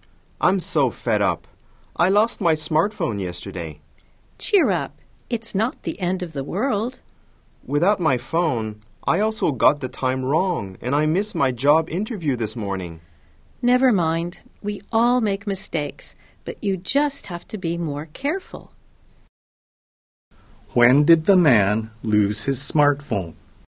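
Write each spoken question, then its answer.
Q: When did the man lose his smartphone?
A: Yesterday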